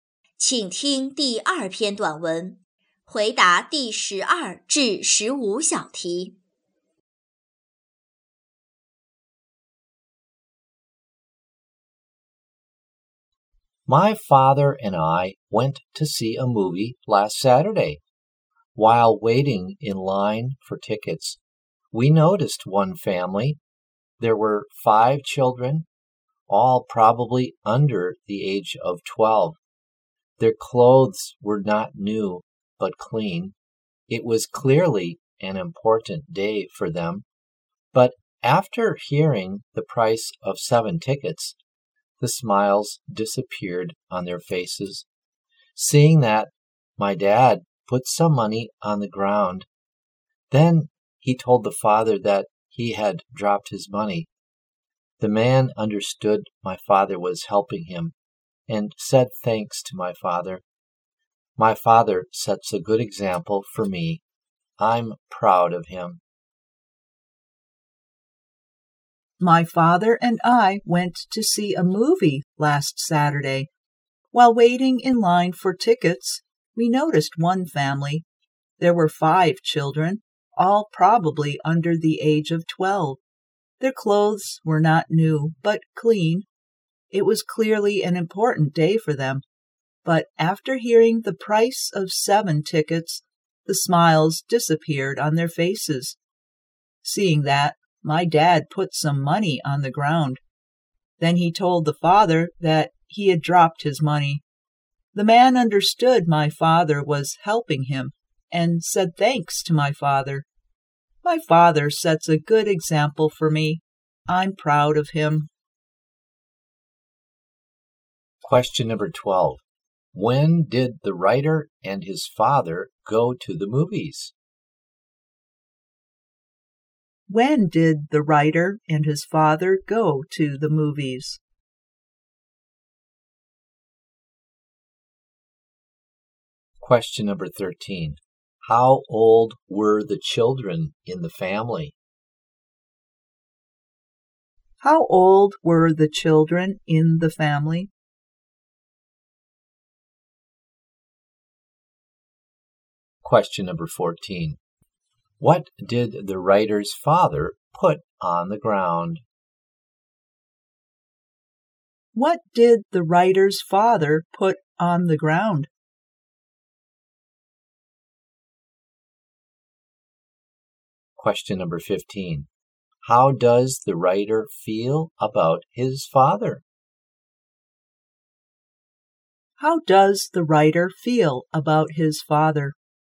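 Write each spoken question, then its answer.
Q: When did the writer and his father go to the movies?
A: Last Saturday

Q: How old were the children in the family?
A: Probably under 12

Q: What did the writer's father put on the ground?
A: Some money

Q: How does the writer feel about his father?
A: Proud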